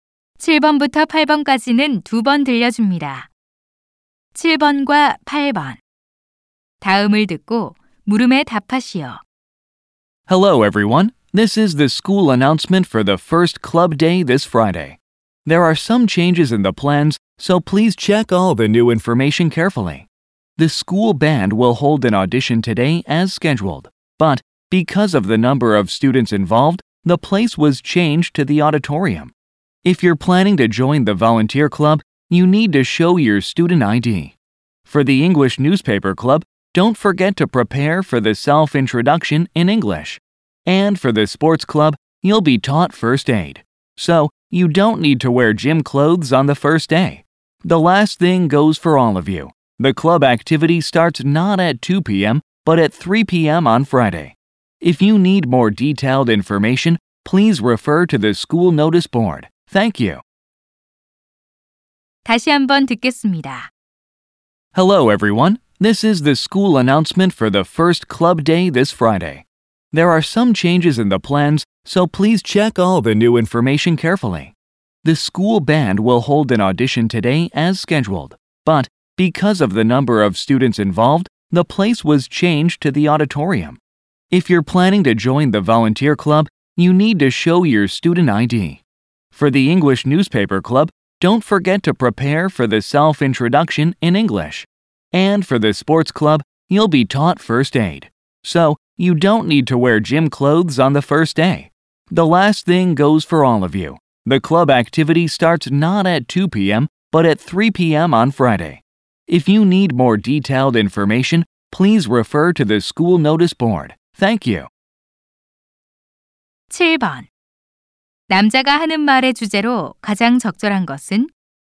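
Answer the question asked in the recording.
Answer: 첫 동아리 날의 변경 사항 안내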